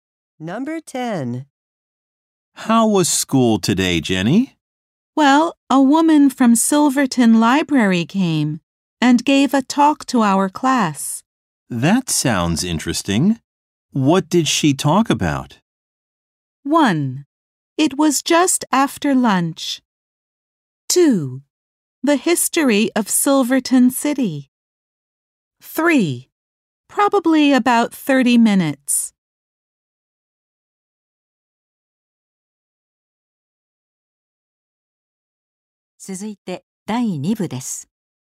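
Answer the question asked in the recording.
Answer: 2: The history of Silverton City.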